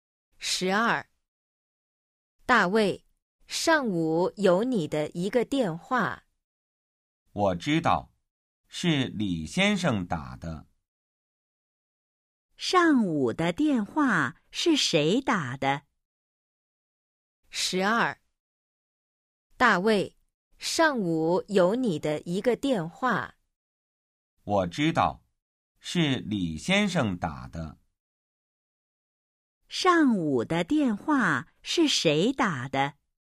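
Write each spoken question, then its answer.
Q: 上午的电话是谁打的?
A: 李先生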